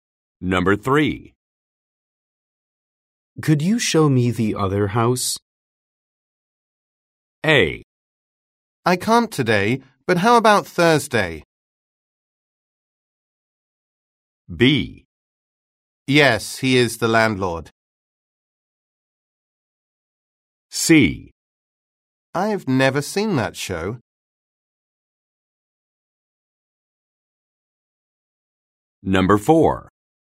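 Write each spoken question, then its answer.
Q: Could you show me the other house?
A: A: I can't today, but how about Thursday?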